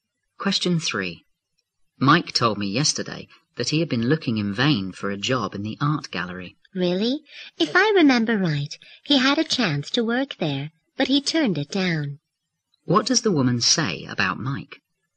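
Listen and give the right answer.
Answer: He had a chance to work at the gallery but turned it down.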